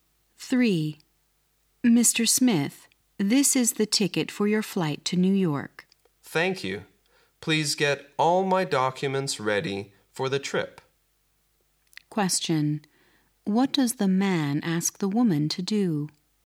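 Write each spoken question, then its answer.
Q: What does the man ask the woman to do?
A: Get all his documents ready for the trip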